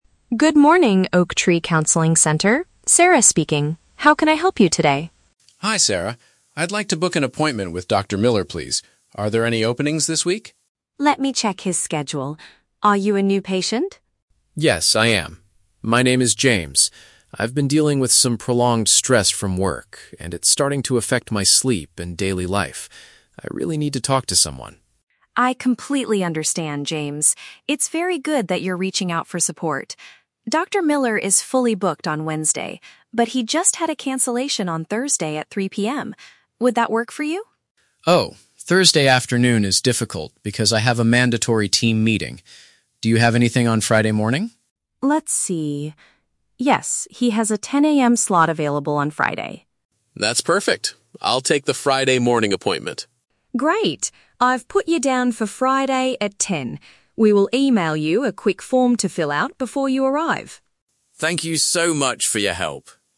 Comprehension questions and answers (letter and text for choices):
Listen to a conversation between a patient and a clinic receptionist. Choose the correct answer (A, B, or C) for each question.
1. Why is James calling the clinic to see a doctor?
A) He is experiencing continuous pressure from his job.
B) He wants to get a prescription for his sleeping problems.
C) He recently suffered a physical injury at his workplace.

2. What is Dr. Miller's schedule like on Thursday?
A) He is completely fully booked for the entire day.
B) He only accepts his regular patients on that day.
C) He has one open time slot in the afternoon.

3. Why does James refuse the 3:00 PM appointment?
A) He needs to complete some medical forms first.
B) He must attend a professional gathering at that time.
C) He thinks the clinic is too far away from his office.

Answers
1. A) He is experiencing continuous pressure from his job.
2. C) He has one open time slot in the afternoon.
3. B) He must attend a professional gathering at that time.

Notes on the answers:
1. James says he has been dealing with "prolonged stress from work". This is paraphrased as "continuous pressure from his job". The Trap (B): He mentions that the stress is affecting his "sleep", but he does not ask for a prescription or sleeping pills (Mentioned but wrong context). Plausible Trap (C): A workplace injury is a valid reason to see a doctor, but James specifically needs to "talk to someone" about stress, not a physical injury (Not mentioned).
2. Sarah says Dr. Miller "had a cancellation on Thursday at 3:00 PM", which means there is one open space. This matches option C. The Trap (A): The phrase "fully booked" is used in the audio, but Dr. Miller is fully booked on Wednesday, not Thursday (Mentioned but rejected). Plausible Trap (B): Sarah asks if James is a "new patient", making regular/new patients a topic, but she never says Dr. Miller only sees regular patients on Thursdays (Mentioned but wrong context).
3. James says he cannot make it on Thursday afternoon because he has a "mandatory team meeting". This is paraphrased as attending a "professional gathering". The Trap (A): A "form" is mentioned at the end of the conversation, but he has to fill it out before his Friday appointment. It is not the reason he rejected Thursday (Mentioned but wrong context). Plausible Trap (C): Distance from the office is a common reason to miss a 3:00 PM appointment, but it is never mentioned in the audio.

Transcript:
Sarah: Good morning, Oak Tree Counseling Center. Sarah speaking. How can I help you today?
James: Hi Sarah. I'd like to book an appointment with Dr. Miller, please. Are there any openings this week?
Sarah: Let me check his schedule. Are you a new patient?
James: Yes, I am. My name is James. I've been dealing with some prolonged stress from work, and it's starting to affect my sleep and daily life. I really need to talk to someone.
Sarah: I completely understand, James. It's very good that you're reaching out for support. Dr. Miller is fully booked on Wednesday, but he just had a cancellation on Thursday at 3:00 PM. Would that work for you?
James: Oh, Thursday afternoon is difficult because I have a mandatory team meeting. Do you have anything on Friday morning?
Sarah: Let's see... Yes, he has a 10:00 AM slot available on Friday.
James: That's perfect. I'll take the Friday morning appointment.
Sarah: Great. I've put you down for Friday at 10. We will email you a quick form to fill out before you arrive.
James: Thank you so much for your help.